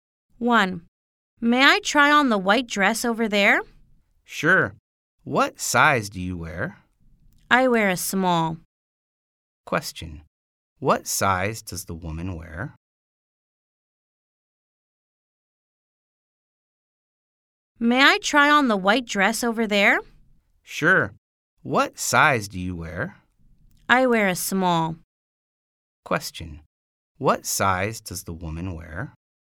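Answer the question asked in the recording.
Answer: Small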